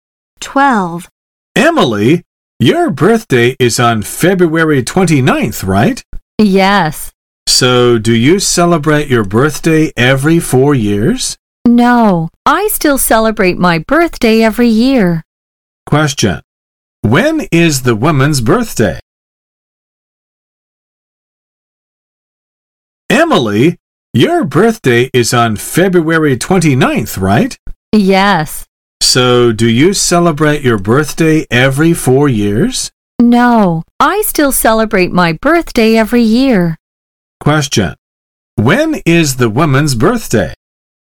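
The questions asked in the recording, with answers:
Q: When is the woman's birthday?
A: February 29th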